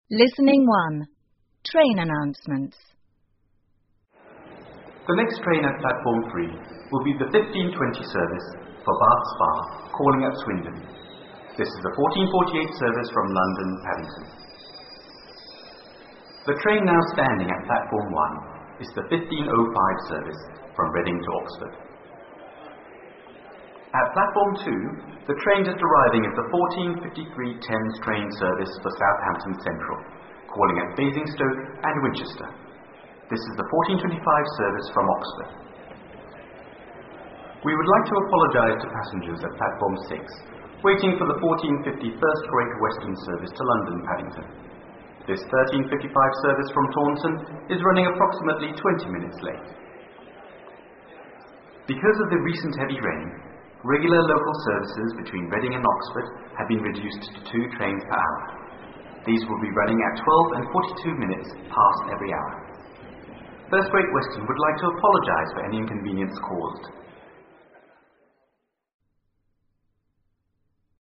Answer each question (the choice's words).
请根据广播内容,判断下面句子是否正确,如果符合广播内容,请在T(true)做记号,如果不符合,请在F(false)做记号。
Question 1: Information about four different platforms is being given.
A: T

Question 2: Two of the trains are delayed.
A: F

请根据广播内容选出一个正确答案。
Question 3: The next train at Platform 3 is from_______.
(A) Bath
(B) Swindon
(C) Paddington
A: Paddington

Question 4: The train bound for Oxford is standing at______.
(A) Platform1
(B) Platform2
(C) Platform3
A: Platform1

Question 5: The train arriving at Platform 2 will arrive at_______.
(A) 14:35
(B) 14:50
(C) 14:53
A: 14:53

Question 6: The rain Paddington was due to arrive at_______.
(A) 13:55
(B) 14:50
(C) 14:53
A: 14:50

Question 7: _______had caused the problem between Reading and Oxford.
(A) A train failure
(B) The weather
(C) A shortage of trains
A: The weather

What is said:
The next train at Platform 3 will be the 15:20 service for Bath Spa calling at Swindon. This is the14:48 service from London, Paddington.
The train now standing at Platform 1 is the 15:05 service from Reading to Oxford.At Platform 2, the train just arriving is the 14:53 Thames train service for Southampton Central, calling at Basingstoke and Winchester. This is the 14:25 service from Oxford.
We would like to apologize to passengers at Platform 6 waiting for the 14:50 First Great Western service to London, Paddington. This 13:55 service from Taunton is running approximately 20 minutes late.
Because of the recent heavy rain, regular local services between Reading and Oxford have been reduced to two trains per hour. These will be running at 12 and 42 minutes past every hour. First Great Western would like to apologize for any inconvenience caused.